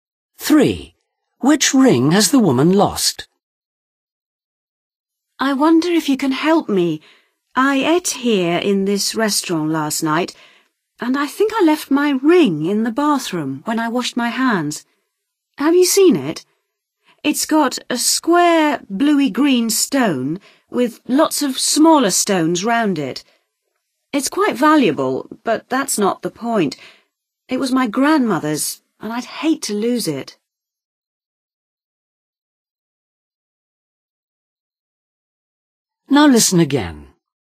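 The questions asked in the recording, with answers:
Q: Which ring has the woman lost?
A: a ring with a square bluey-green stone surrounded by smaller stones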